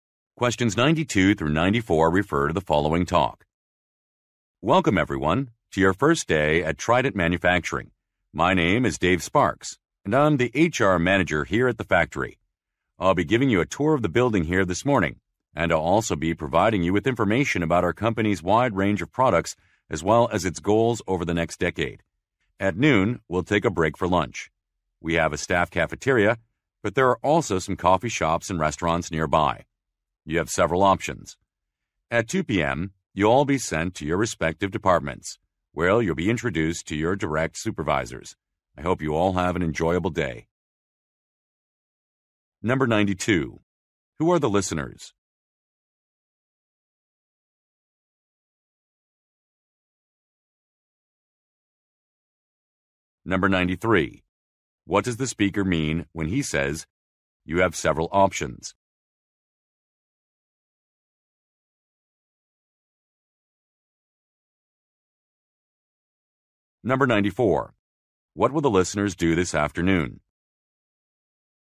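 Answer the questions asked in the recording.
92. New employees
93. They can eat lunch at the cafeteria or nearby places
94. Go to their departments and meet their supervisors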